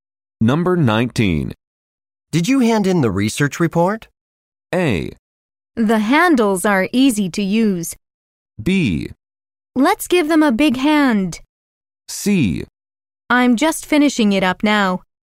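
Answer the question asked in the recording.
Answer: C: I'm just finishing it up now.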